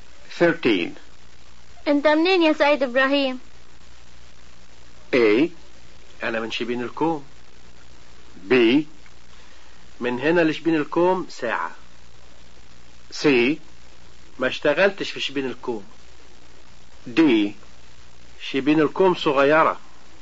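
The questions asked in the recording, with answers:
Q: انت منين يا سيد ابراهيم؟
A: A: أنا من شبين الكوم.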